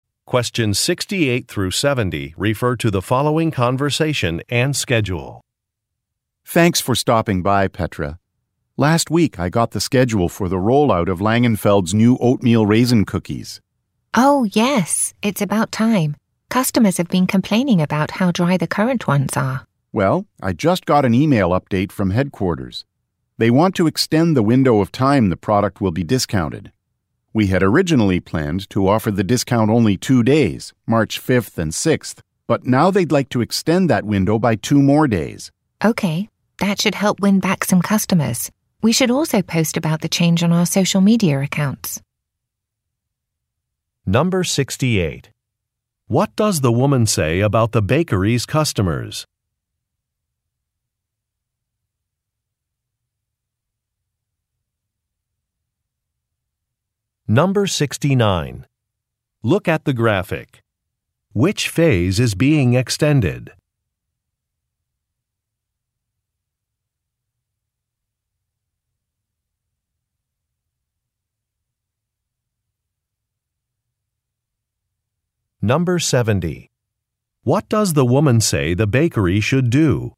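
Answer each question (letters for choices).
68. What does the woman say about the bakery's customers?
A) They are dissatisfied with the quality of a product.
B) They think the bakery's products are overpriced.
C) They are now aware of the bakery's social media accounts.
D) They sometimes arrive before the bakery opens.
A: A

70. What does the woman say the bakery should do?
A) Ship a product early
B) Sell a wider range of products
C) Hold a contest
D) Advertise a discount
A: D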